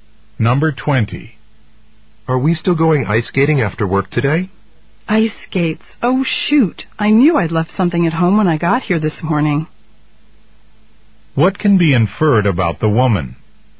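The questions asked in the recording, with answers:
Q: What can be inferred about the woman?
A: She left her ice skates at home.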